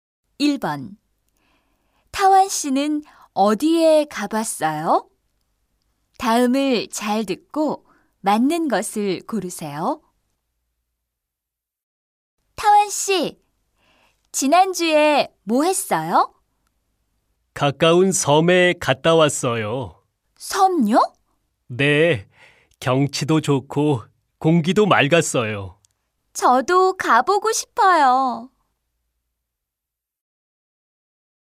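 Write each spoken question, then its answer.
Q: 타완 씨는 어디에 가봤어요?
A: 가까운 섬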